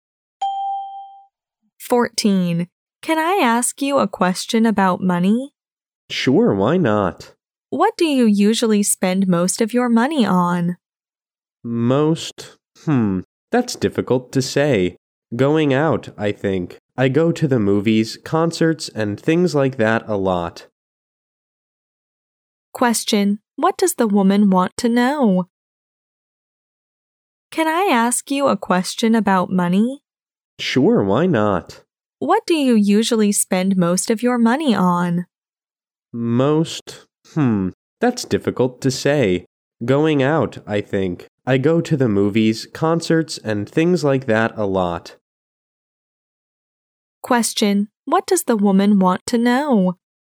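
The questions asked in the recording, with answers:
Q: Question: what does the woman want to know?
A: What the man usually spends most of his money on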